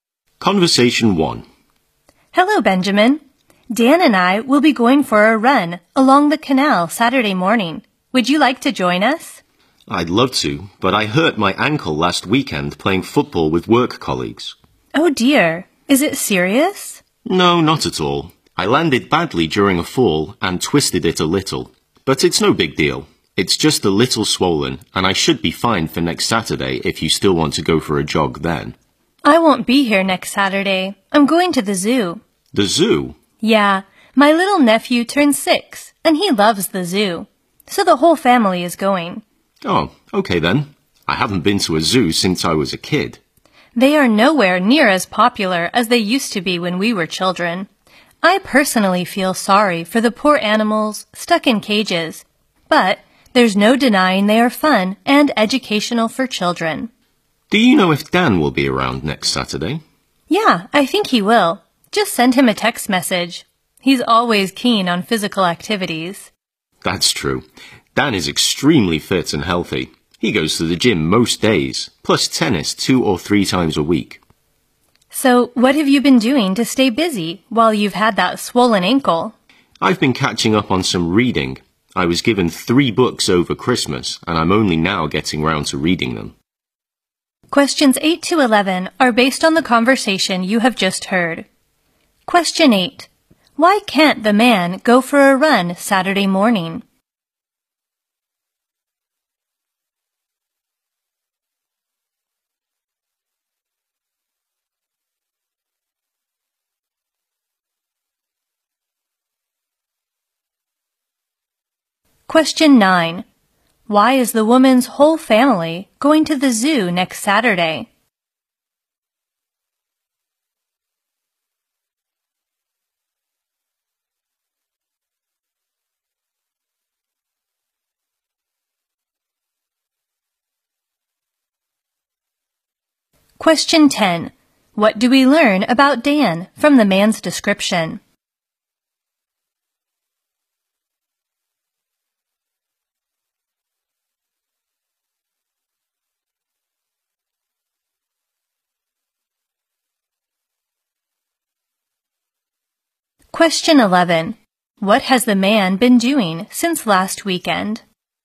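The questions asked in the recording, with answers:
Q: Why can't the man go for a run Saturday morning?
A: He hurt his ankle playing football.

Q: Why is the woman's whole family going to the zoo next Saturday?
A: It's her nephew's sixth birthday, and he loves the zoo.

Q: What do we learn about Dan from the man's description?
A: He is very fit and healthy and likes physical activities.

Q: What has the man been doing since last weekend?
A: Catching up on his reading.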